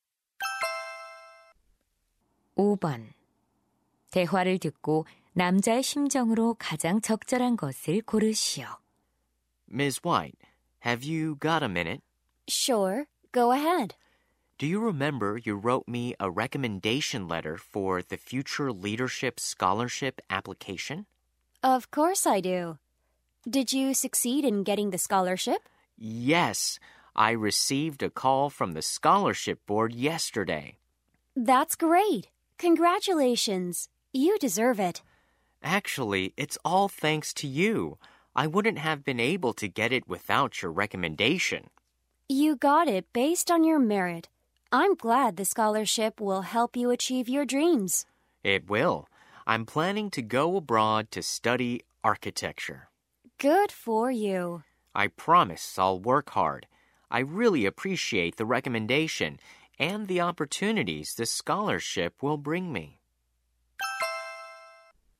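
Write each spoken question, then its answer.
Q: 대화를 듣고 남자의 심정으로 가장 적절한 것을 고르시오.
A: 감사하는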